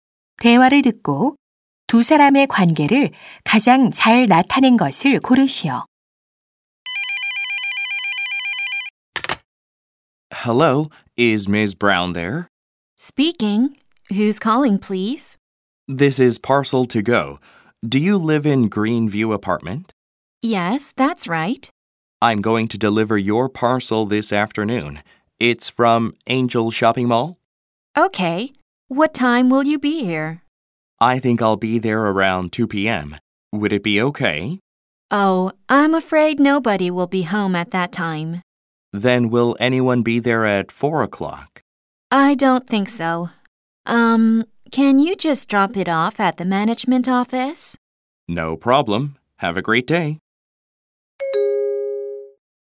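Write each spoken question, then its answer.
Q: 대화를 듣고 두 사람의 관계를 가장 잘 나타낸 것을 고르시오.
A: 택배 기사 - 고객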